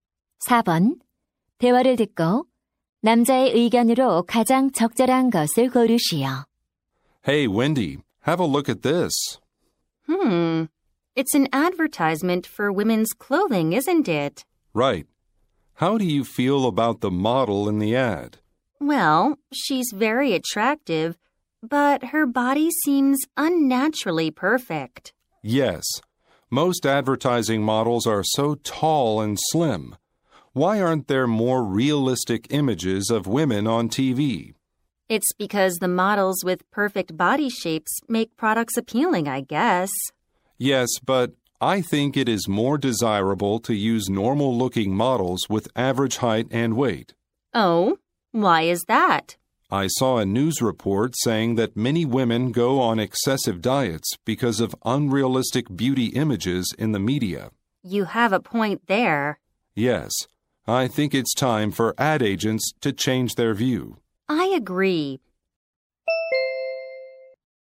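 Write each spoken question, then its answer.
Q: 대화를 듣고 남자의 의견으로 가장 적절한 것을 고르시오.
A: 광고에 평범한 체형의 모델을 쓰는 것이 바람직하다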